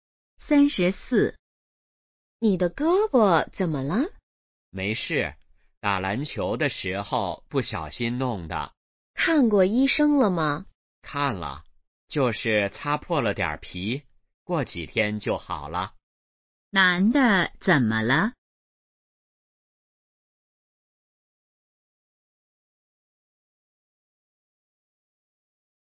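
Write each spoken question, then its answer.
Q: 男的怎么了?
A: 打篮球时胳膊擦破了皮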